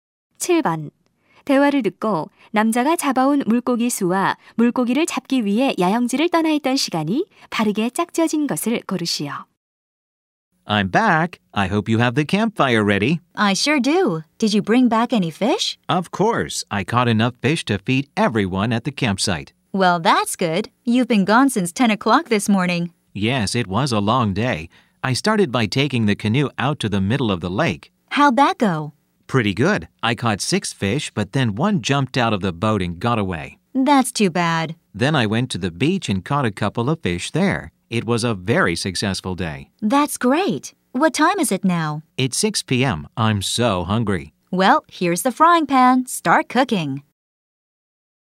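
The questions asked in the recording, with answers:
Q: 대화를 듣고 남자가 잡아온 물고기 수와 물고기를 잡기 위해 야영지를 떠나 있던 시간이 바르게 짝지어진 것을 고르시오.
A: 7마리, 8시간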